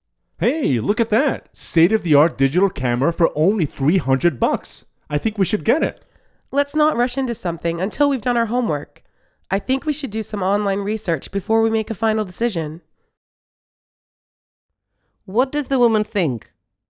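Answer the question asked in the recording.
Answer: They should research online before buying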